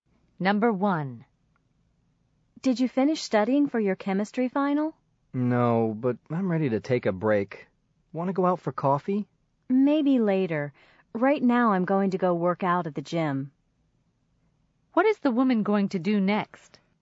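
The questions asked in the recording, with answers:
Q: What is the woman going to do next?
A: Work out at the gym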